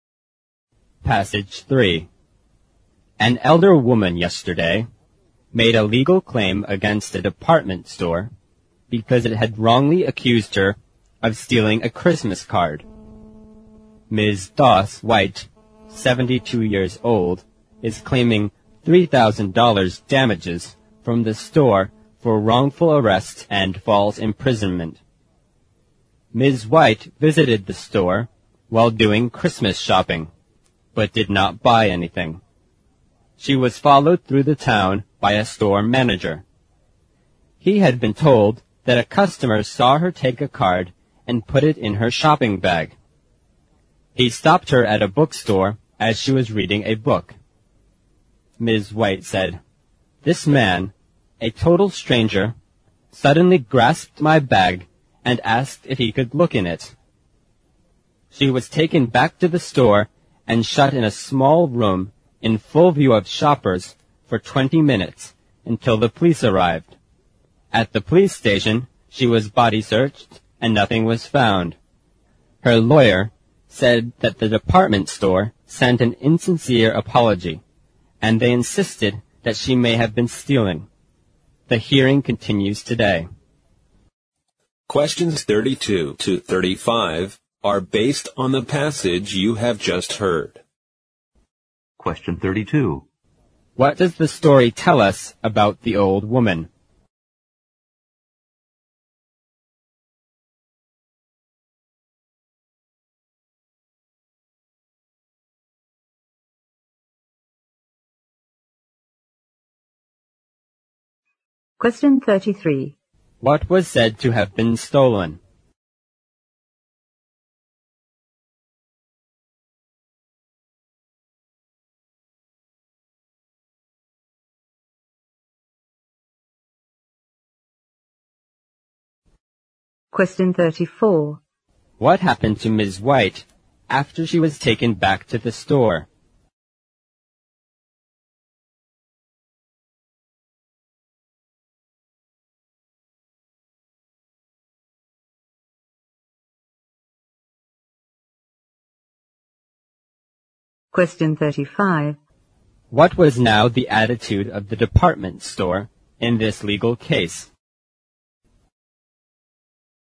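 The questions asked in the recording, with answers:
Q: What was said to have been stolen?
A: A Christmas card

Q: What happened to Ms. White after she was taken back to the store?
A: She was shut in a small room in full view of shoppers for 20 minutes until the police arrived

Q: What was now the attitude of the department store in this legal case?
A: It sent an insincere apology and insisted she may have been stealing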